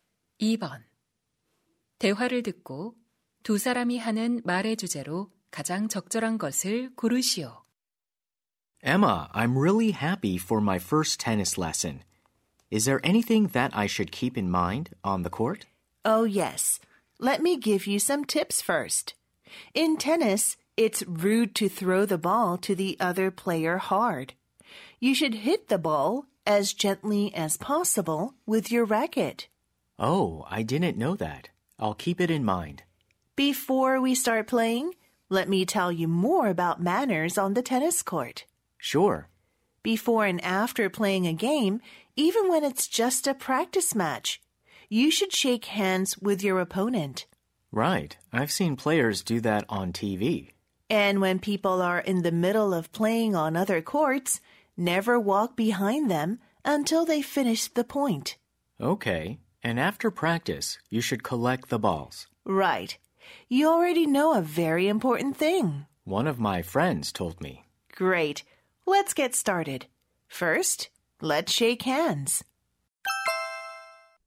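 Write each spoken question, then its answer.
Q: 대화를 듣고 두 사람이 하는 말의 주제로 가장 적절한 것을 고르시오.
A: 테니스 코트에서 지켜야 할 예절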